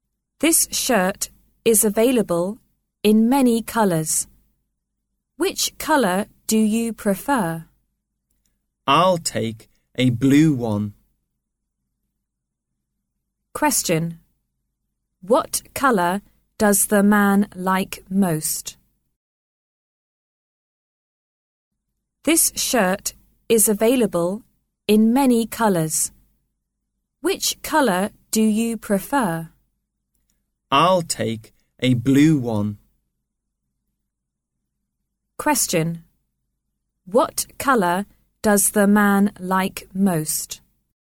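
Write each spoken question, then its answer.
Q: What colour does the man like most?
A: Blue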